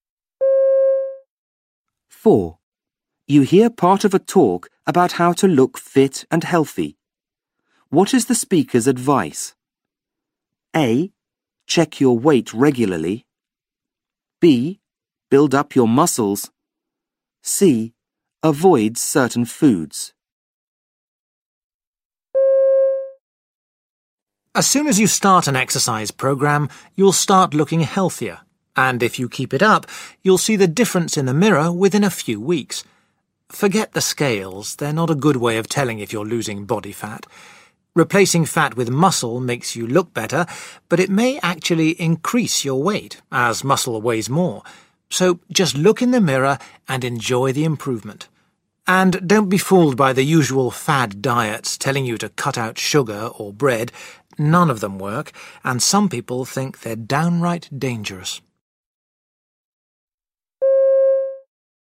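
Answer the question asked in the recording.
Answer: B: Build up your muscles.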